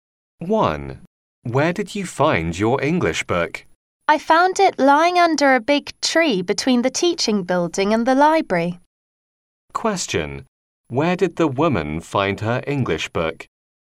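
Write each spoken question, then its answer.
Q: Where did the woman find her English book?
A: Under a big tree between the teaching building and the library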